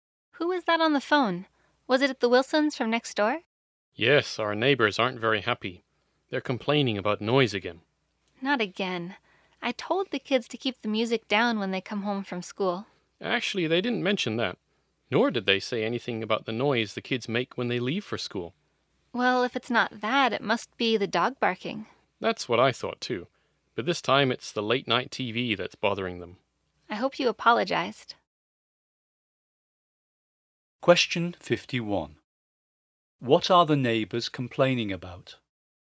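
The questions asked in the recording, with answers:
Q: What are the neighbors complaining about?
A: The late-night TV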